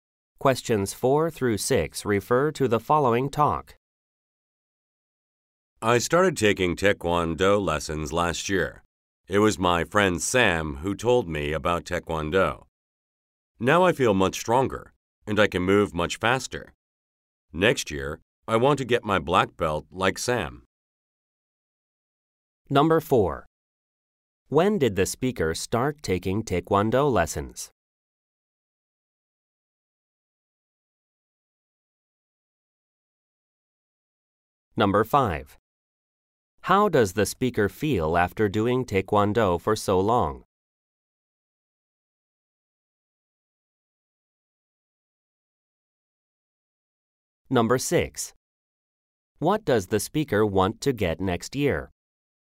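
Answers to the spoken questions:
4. Last year
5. Much stronger and faster
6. A black belt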